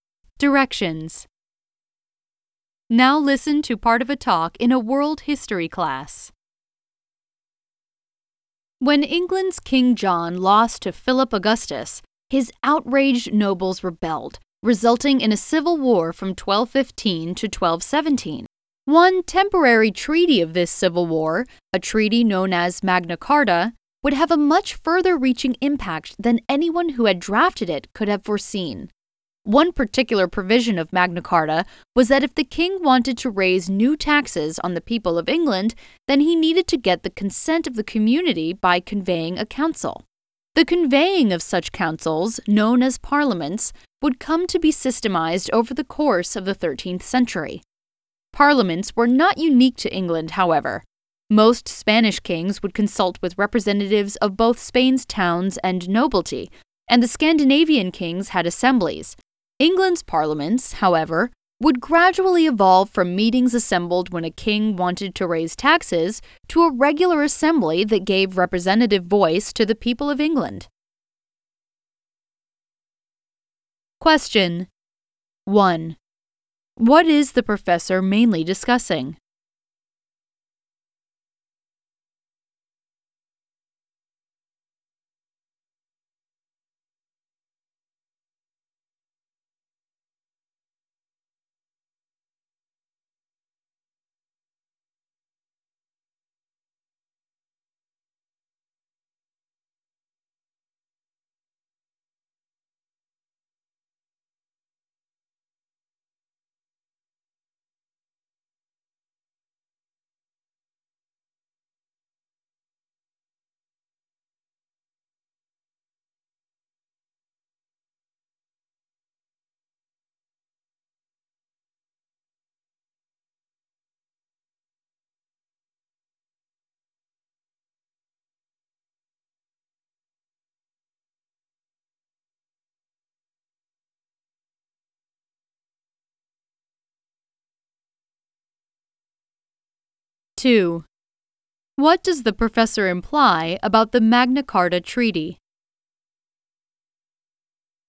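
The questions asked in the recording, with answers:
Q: What is the professor mainly discussing?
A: How Magna Carta led to the development of England's parliaments

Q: What does the professor imply about the Magna Carta Treaty?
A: Its impact went much further than its drafters expected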